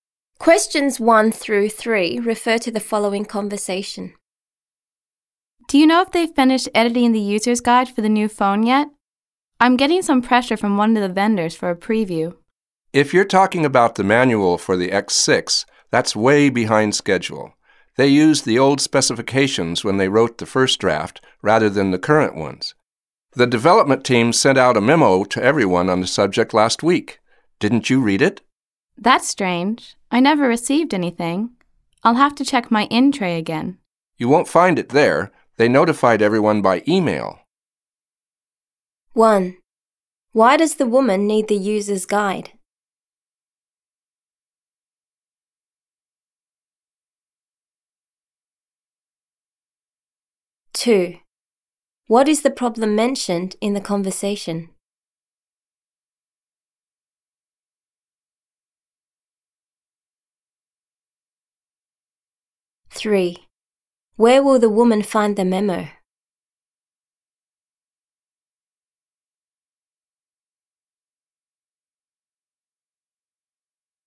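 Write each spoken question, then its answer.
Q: Why does the woman need the user's guide?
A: A vendor wants a preview of it.

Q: What is the problem mentioned in the conversation?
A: The manual is behind schedule because the first draft used old specifications.

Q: Where will the woman find the memo?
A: In her email.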